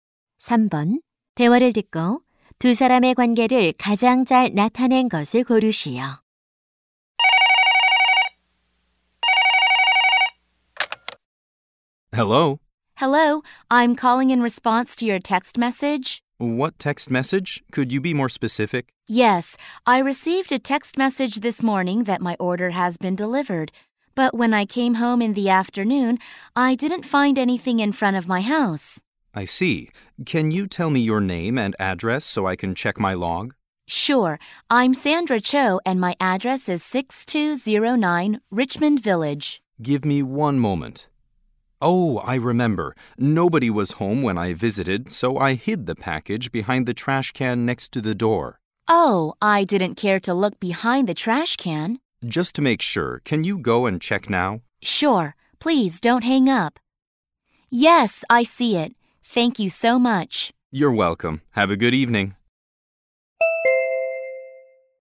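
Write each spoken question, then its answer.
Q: 대화를 듣고 두 사람의 관계를 가장 잘 나타낸 것을 고르시오.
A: 고객 - 택배 기사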